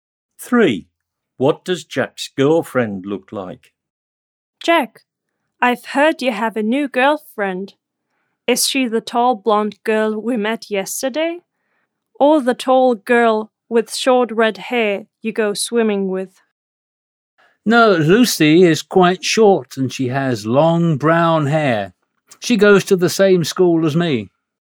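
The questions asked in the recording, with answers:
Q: What does Jack's girlfriend look like?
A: Quite short with long brown hair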